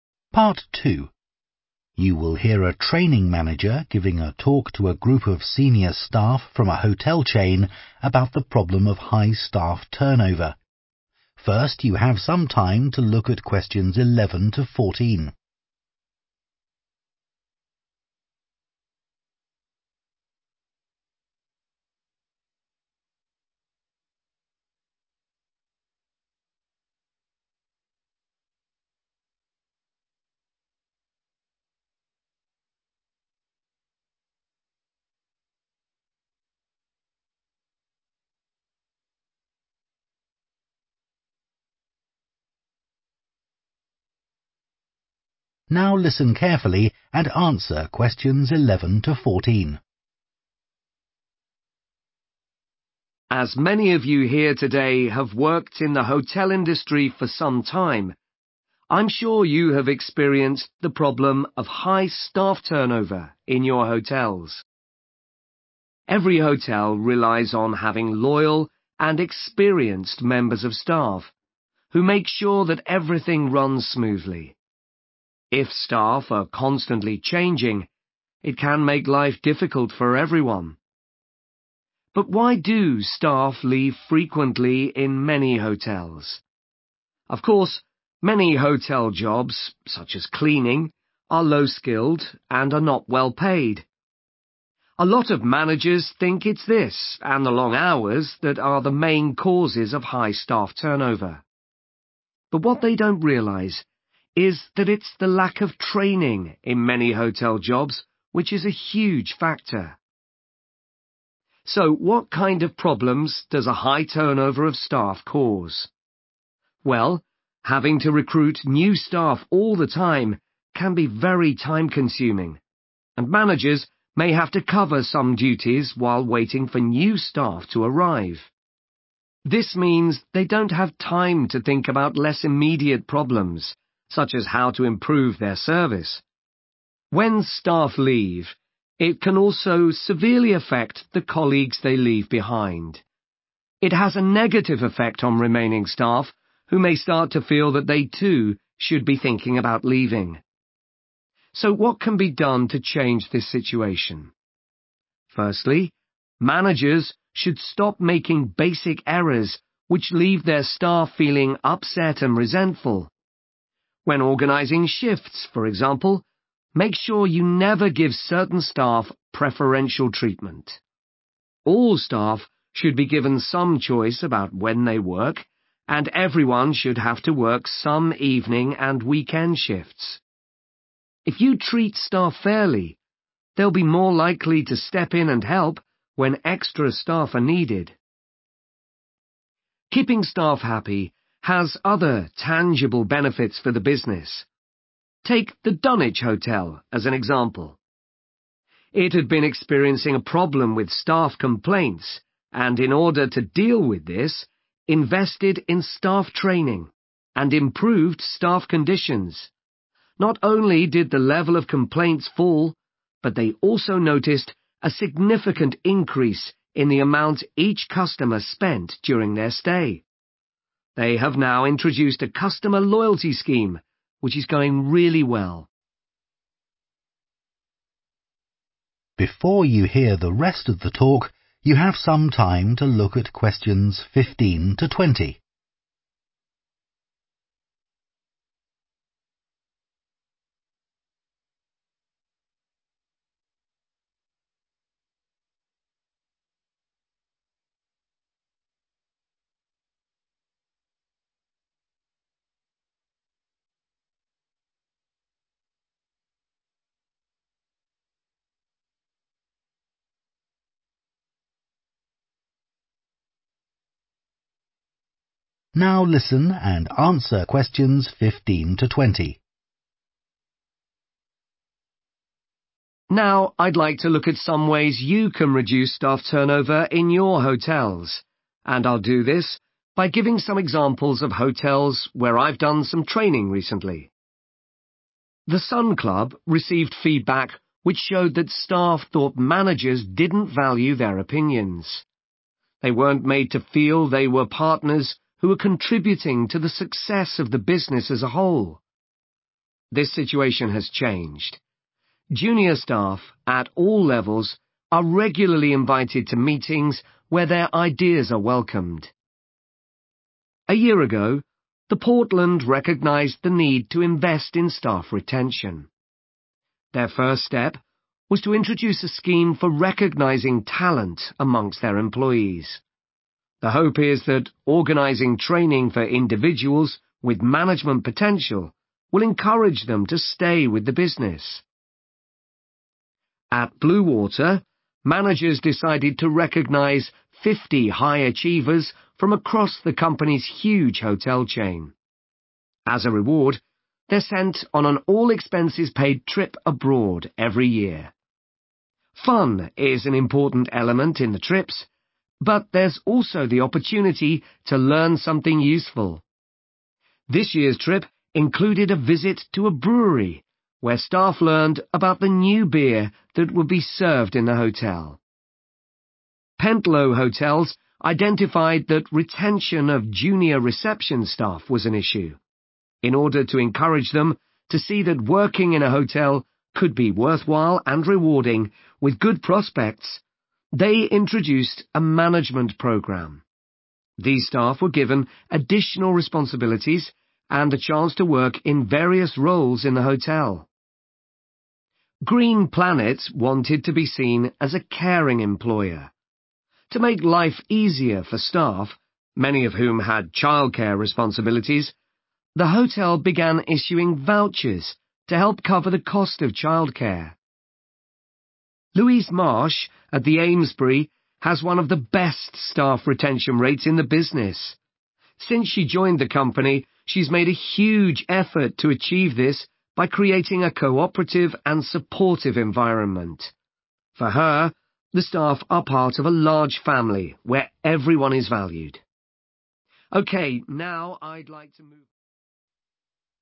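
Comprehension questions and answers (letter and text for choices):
Choose the correct letter, AB or C.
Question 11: Many hotel managers are unaware that their staff often leave because of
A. a lack of training.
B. long hours.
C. low pay.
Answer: A. a lack of training.

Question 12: What is the impact of high staff turnover on managers?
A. an increased workload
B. low morale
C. an inability to meet targets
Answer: A. an increased workload

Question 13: What mistake should managers always avoid?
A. failing to treat staff equally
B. reorganising shifts without warning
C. neglecting to have enough staff during busy periods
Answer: A. failing to treat staff equally

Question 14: What unexpected benefit did Dunwich Hotel notice after improving staff retention rates?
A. a fall in customer complaints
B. an increase in loyalty club membership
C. a rise in spending per customer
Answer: C. a rise in spending per customer

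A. improving relationships and teamwork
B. offering incentives and financial benefits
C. providing career opportunities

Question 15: The Sun Club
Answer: A. improving relationships and teamwork

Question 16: The Portland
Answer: C. providing career opportunities

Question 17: Bluewater Hotels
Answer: B. offering incentives and financial benefits

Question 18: Pentlow Hotels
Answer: C. providing career opportunities

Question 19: Green Planet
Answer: B. offering incentives and financial benefits

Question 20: The Amesbury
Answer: A. improving relationships and teamwork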